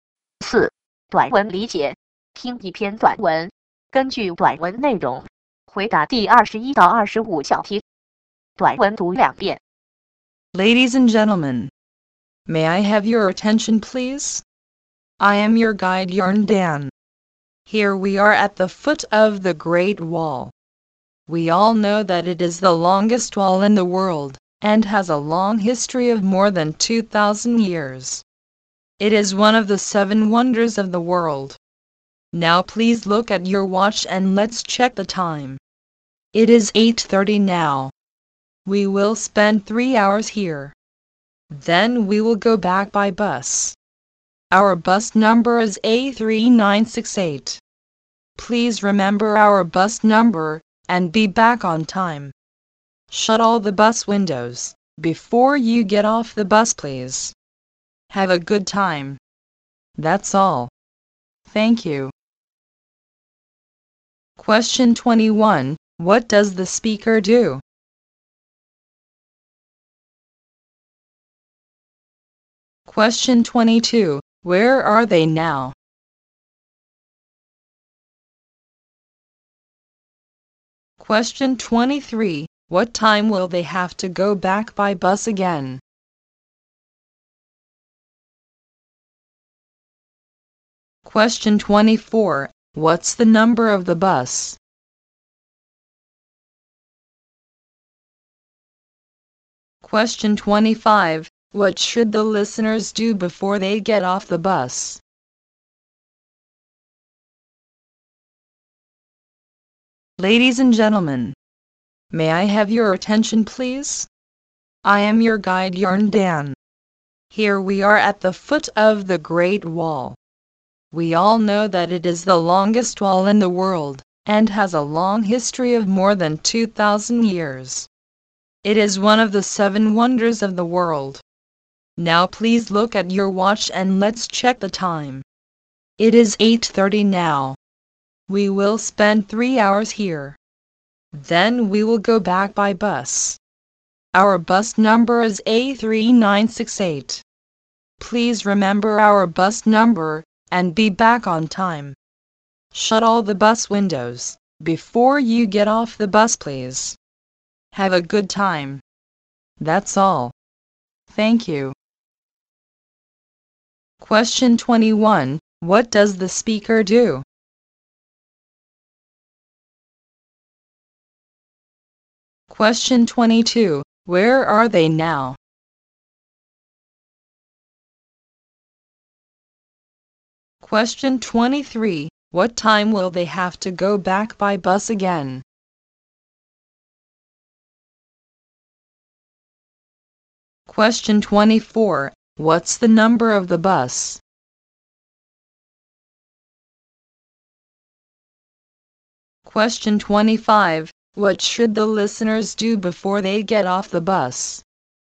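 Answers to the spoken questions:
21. A guide
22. At the foot of the Great Wall
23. At 11:30
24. A3968
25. Shut all the bus windows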